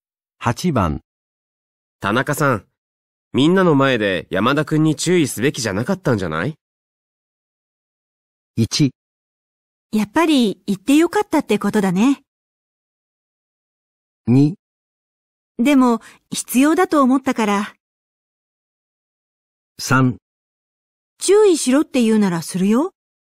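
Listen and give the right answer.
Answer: 2: でも必要だと思ったから。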